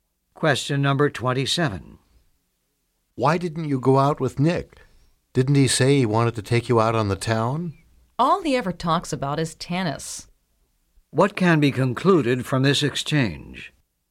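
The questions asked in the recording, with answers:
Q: What can be concluded from this exchange?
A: She finds Nick boring because he only talks about tennis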